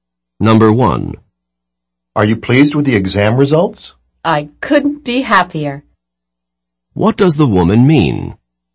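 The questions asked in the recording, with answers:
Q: What does the woman mean?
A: She is extremely pleased with the exam results.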